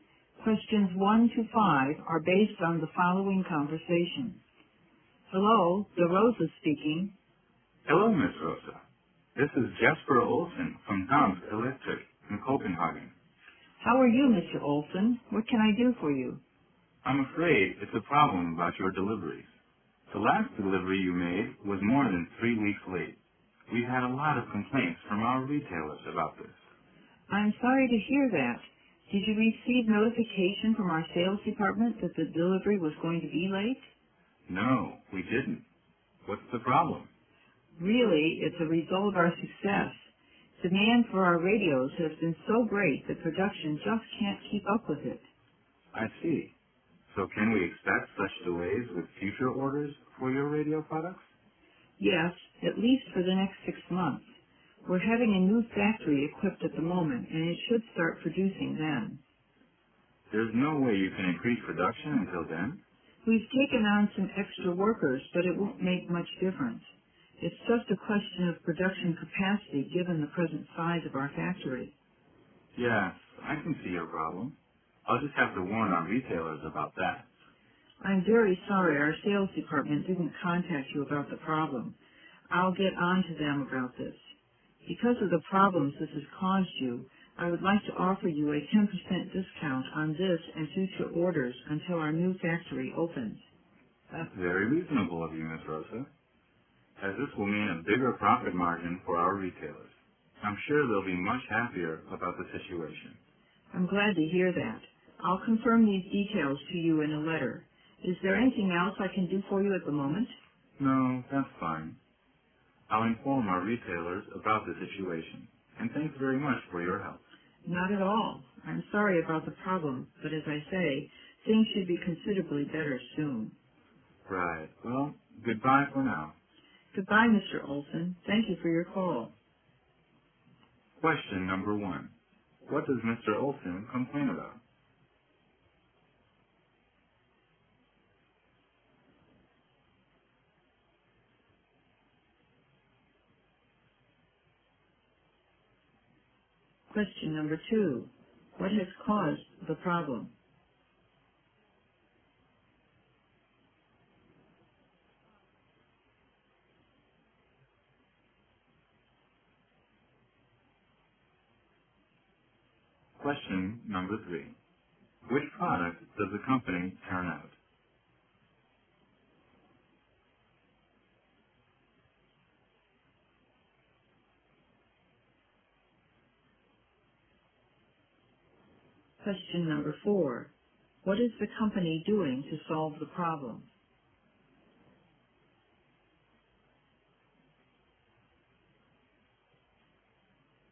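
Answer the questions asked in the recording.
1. The last delivery was more than 3 weeks late
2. Demand for their radios is so great that production can't keep up
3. Radios
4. Equipping a new factory (and taking on extra workers)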